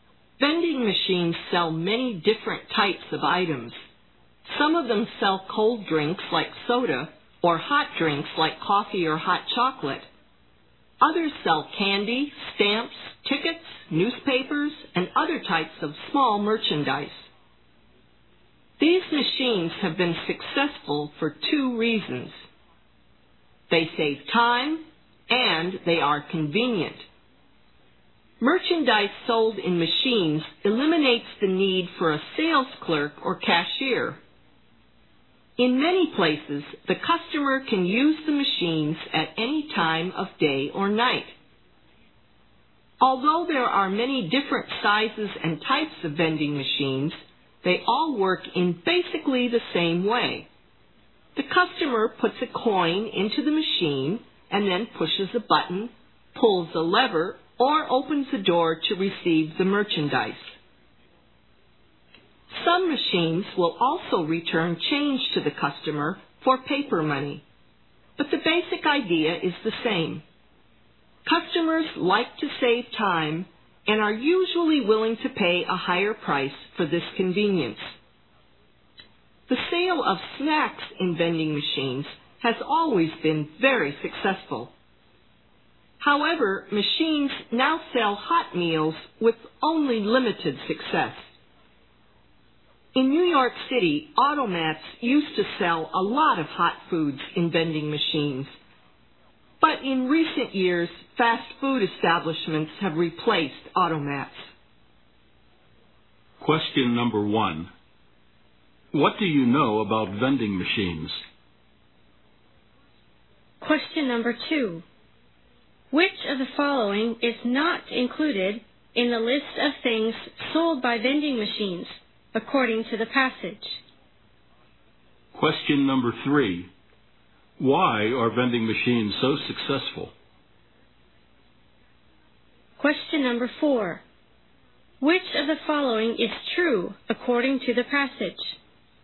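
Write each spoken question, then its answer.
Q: Why are vending machines so successful?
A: They save time and are convenient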